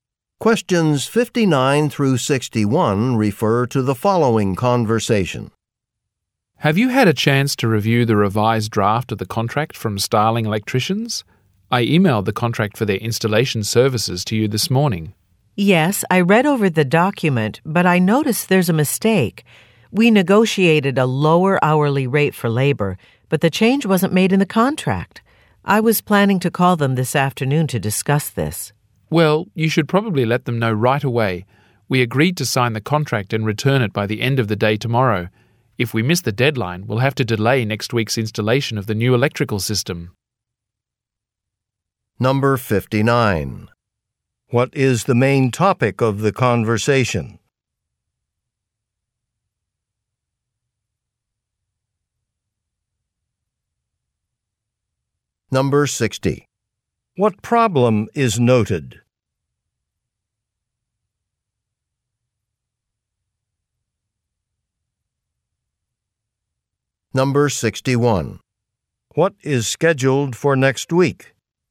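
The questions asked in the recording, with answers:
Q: What is the main topic of the conversation?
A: A contract with Starling Electricians

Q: What problem is noted?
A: The lower hourly labor rate is missing from the contract

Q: What is scheduled for next week?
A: Installation of a new electrical system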